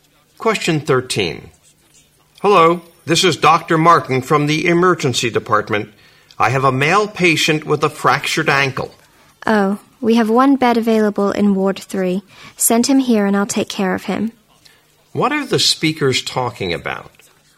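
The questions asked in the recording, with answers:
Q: What are the speakers talking about?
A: Finding a hospital bed for a patient with a fractured ankle.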